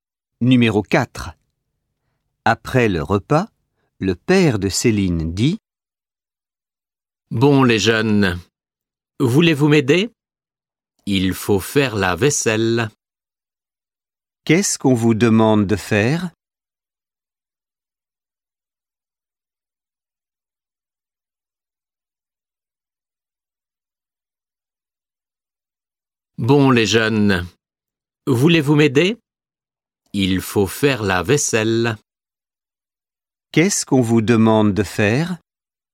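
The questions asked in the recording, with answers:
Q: Qu'est-ce qu'on vous demande de faire ?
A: Faire la vaisselle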